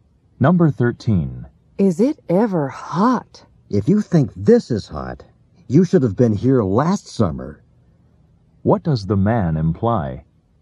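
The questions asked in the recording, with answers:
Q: What does the man imply?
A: It was even hotter last summer.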